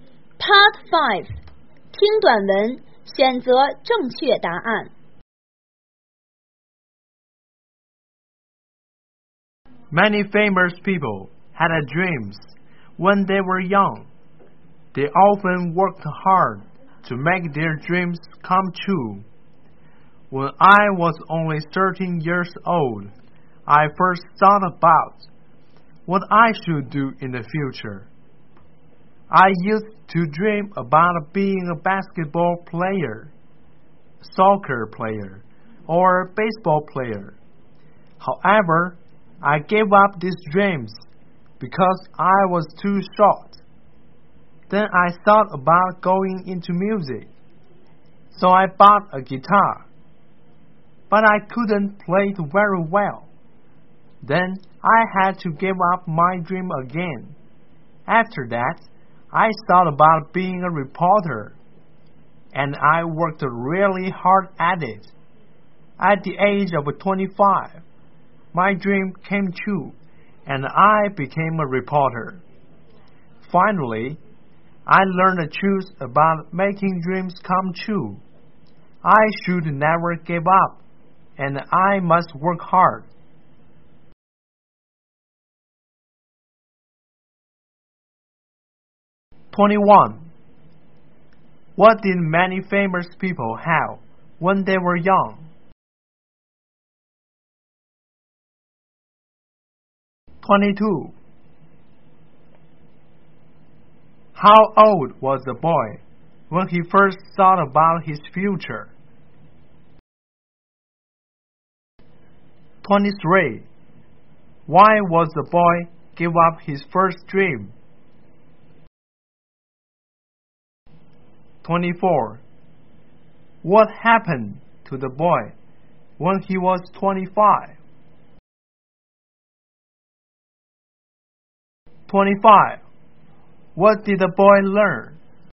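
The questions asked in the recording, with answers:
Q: What did many famous people have when they were young?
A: Dreams

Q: How old was the boy when he first thought about his future?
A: 13

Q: 23. Why was the boy give up his first dream?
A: Because he was too short

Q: 24. What happened to the boy when he was 25?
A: He became a reporter

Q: 25. What did the boy learn?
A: Never give up and work hard to make dreams come true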